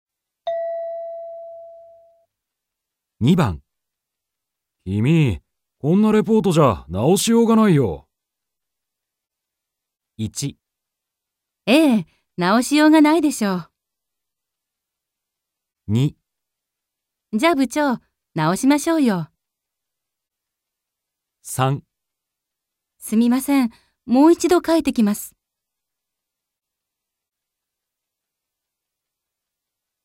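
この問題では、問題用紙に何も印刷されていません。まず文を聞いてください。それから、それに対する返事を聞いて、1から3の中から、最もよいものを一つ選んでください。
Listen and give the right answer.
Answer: 3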